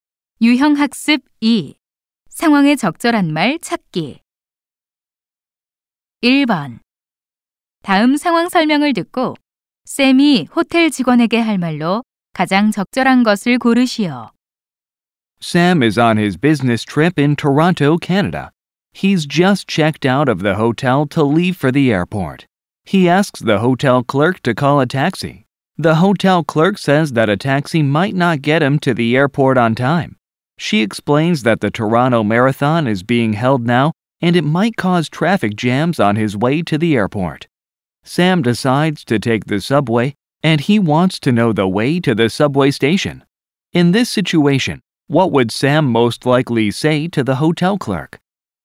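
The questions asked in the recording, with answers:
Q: In this situation, what would Sam most likely say to the hotel clerk?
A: Could you tell me how to get to the subway station?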